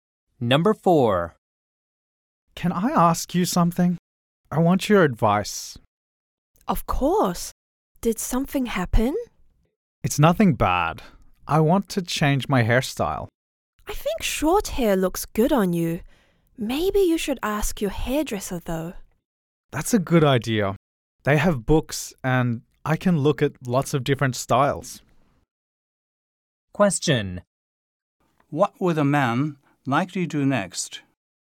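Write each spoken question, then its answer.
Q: What will the man likely do next?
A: Ask his hairdresser and look at hairstyle books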